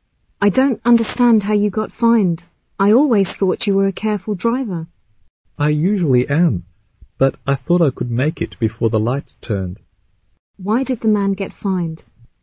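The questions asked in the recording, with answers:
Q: Why did the man get fined?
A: He went through a red light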